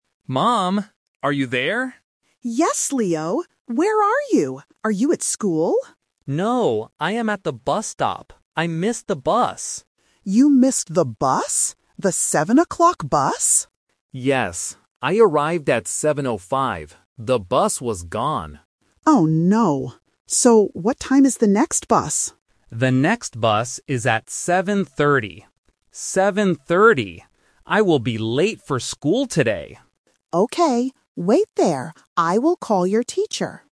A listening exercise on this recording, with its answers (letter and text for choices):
Listen to the conversation and choose the correct answer (A, B, or C).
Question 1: Where is Leo now?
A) At home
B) At school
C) At the bus stop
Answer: C) At the bus stop

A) 7:00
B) 7:05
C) 7:30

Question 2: What time did Leo arrive?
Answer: B) 7:05

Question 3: What time is the next bus?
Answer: C) 7:30

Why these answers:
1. The Key: Leo clearly states his location: "No, I am at the bus stop." The Trap (B): "School" is mentioned when his mom asks, "Are you at school?" and when he says, "I will be late for school," but he is not there yet. (A) is a plausible location for a phone call, but it is not mentioned.
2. The Key: Leo explains when he got there: "I arrived at 7:05." The Trap (A): 7:00 is mentioned, but it is the time the bus left (the bus he missed), not the time he arrived. (C) is a trap because 7:30 is the time for the next bus.
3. The Key: Leo answers his mom's question about the next bus: "The next bus is at 7:30" and repeats "Seven thirty." The Trap (A & B): 7:00 and 7:05 are mentioned earlier in the audio, but they refer to the missed bus and his arrival time.

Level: A1